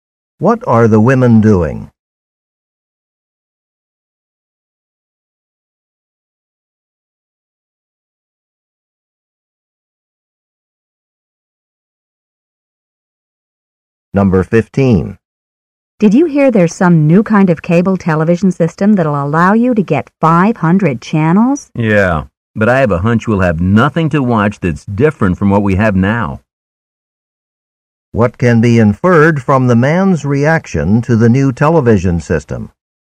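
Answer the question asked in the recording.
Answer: He doubts it will offer anything new to watch.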